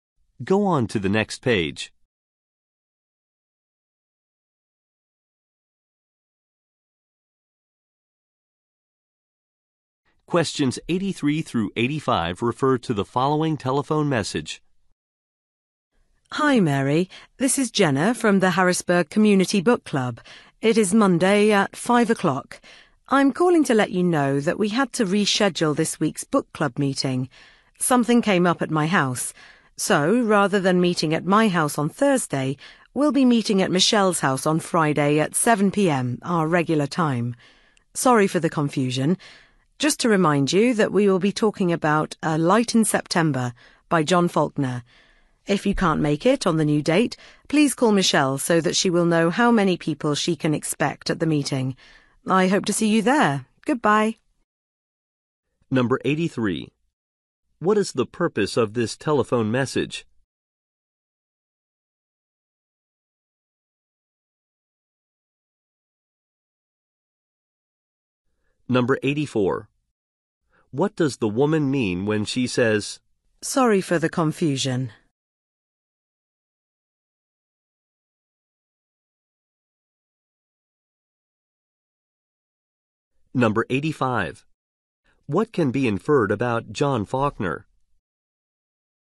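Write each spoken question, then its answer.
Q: What is the purpose of this telephone message?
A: To announce a rescheduled book club meeting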